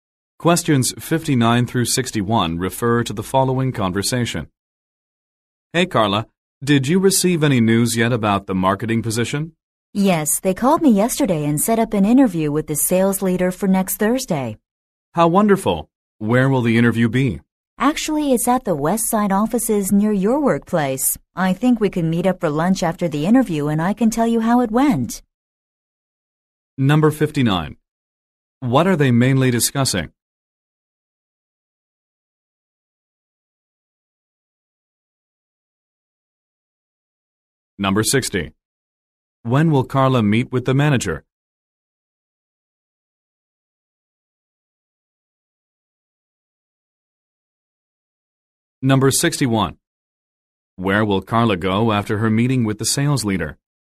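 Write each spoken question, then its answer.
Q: What are they mainly discussing?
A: A job interview for a marketing position

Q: When will Carla meet with the manager?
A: Next Thursday

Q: Where will Carla go after her meeting with the sales leader?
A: To lunch with the man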